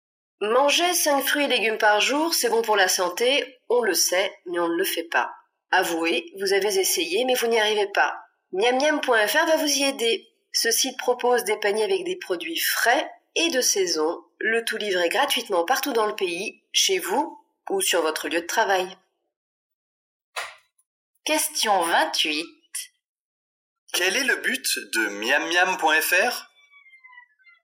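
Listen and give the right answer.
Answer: Aider à manger 5 fruits et légumes par jour en livrant des paniers frais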